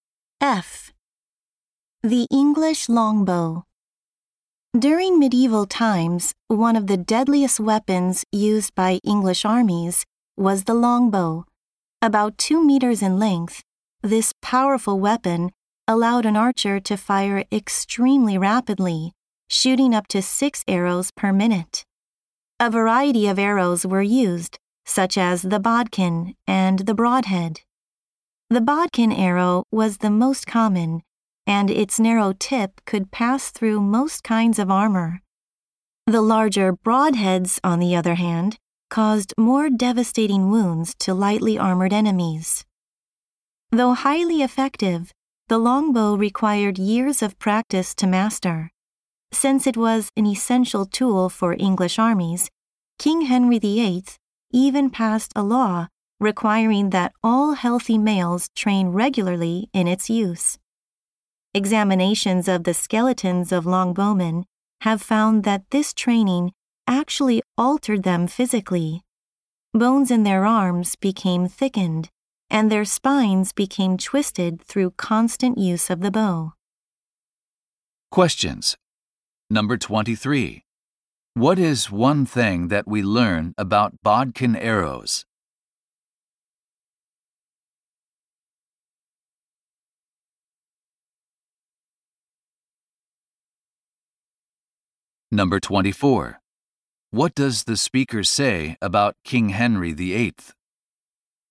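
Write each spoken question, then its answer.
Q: What is one thing that we learn about bodkin arrows?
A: They were the most common and could pass through most kinds of armor.

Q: What does the speaker say about King Henry VIII?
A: He passed a law requiring all healthy males to train regularly with the longbow.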